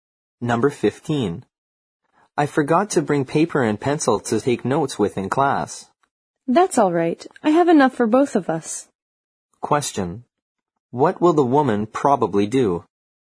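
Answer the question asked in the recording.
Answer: Lend the man paper and pencil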